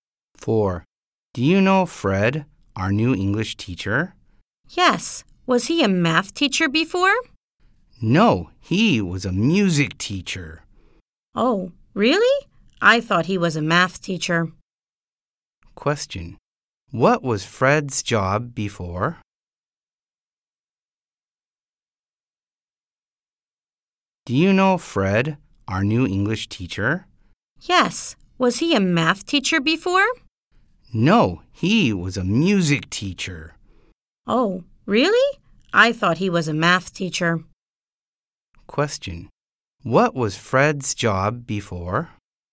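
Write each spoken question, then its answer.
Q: What was Fred's job before?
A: A music teacher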